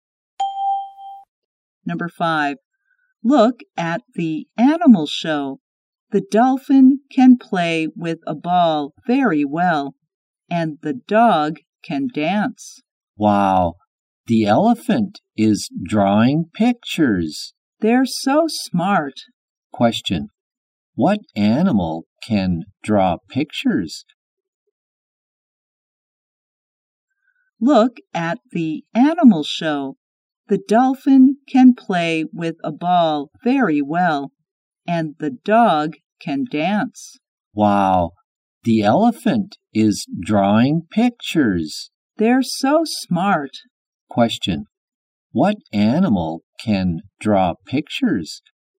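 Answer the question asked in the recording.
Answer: The elephant.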